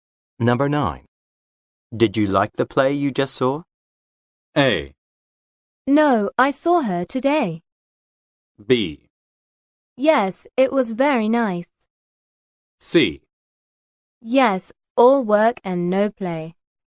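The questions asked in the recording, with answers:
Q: Did you like the play you just saw?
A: B: Yes, it was very nice.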